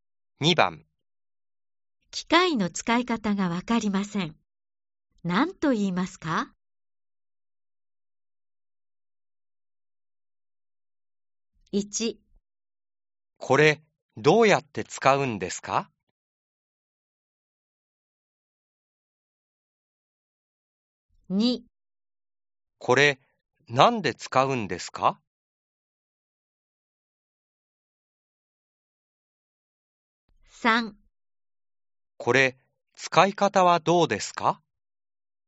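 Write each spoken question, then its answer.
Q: 機械の使い方がわかりません。何と言いますか ?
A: 1: これ、どうやって使うんですか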